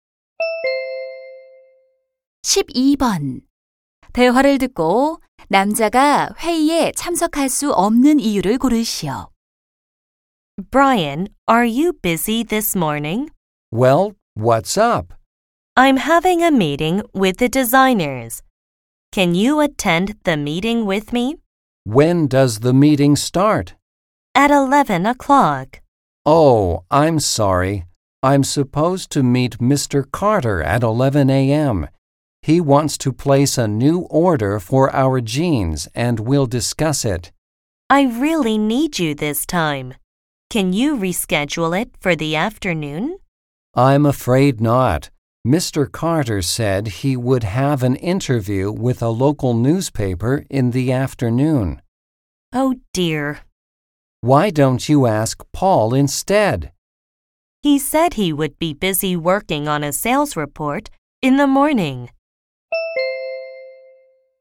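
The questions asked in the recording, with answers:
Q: 대화를 듣고 남자가 회의에 참석할 수 없는 이유를 고르시오.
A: 11시에 Carter 씨와 주문 관련 약속이 있어서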